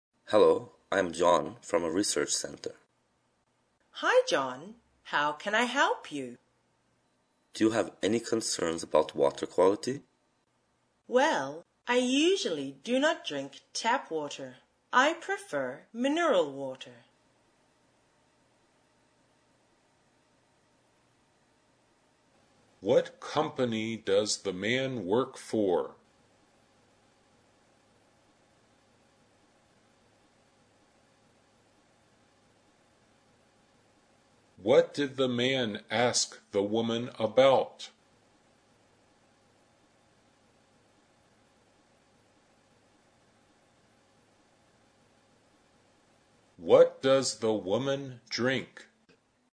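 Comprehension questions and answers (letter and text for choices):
Directions: In this part of the test, you will hear conversations between two speakers.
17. What company does the man work for?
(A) A model agency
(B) A mobile phone company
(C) A hotel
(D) A research center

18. What did the man ask the woman about?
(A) Water quality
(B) Utility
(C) Roof repair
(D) Internet access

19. What does the woman drink?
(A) Boiled water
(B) Warm water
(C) Mineral water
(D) Tap water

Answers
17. (D) A research center
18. (A) Water quality
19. (C) Mineral water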